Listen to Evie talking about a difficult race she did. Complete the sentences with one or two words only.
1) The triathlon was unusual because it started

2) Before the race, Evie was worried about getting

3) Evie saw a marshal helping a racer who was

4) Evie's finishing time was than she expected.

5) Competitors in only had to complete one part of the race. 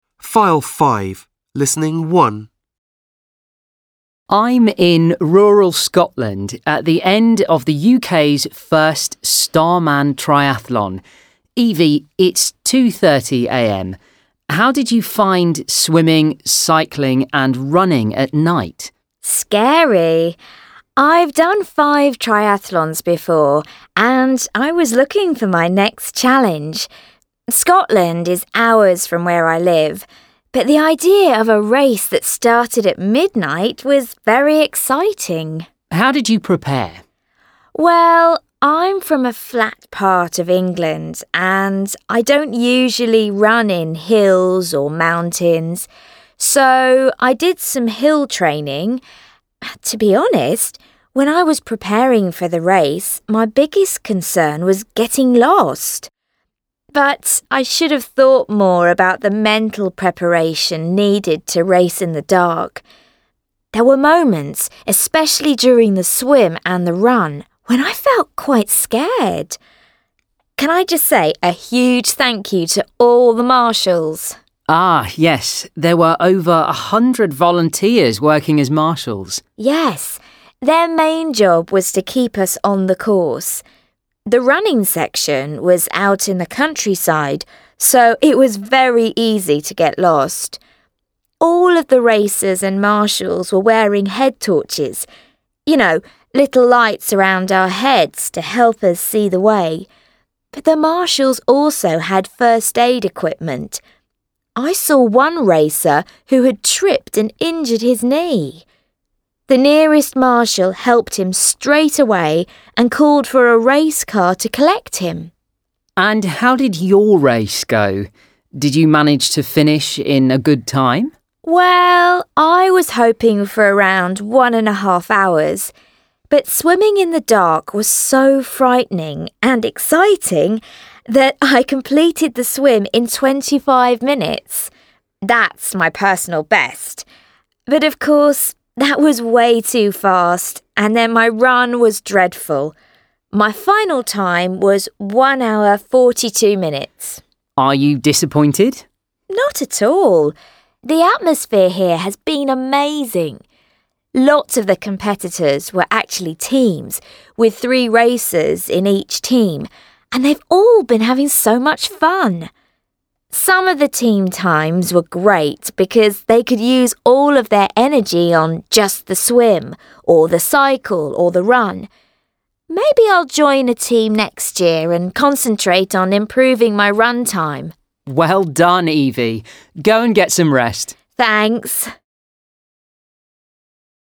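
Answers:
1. at midnight
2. lost
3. injured
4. slower
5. teams

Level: English File B1 – Unit 5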